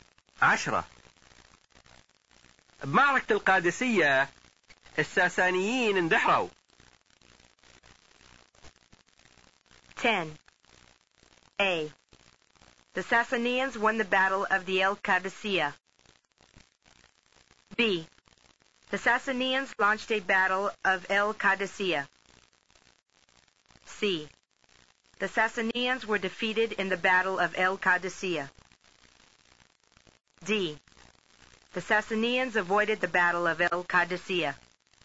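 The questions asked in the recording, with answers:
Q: بمعركة القادسية الساسانيين اندحروا.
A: C: The Sassanians were defeated in the battle of El Qadisiyya.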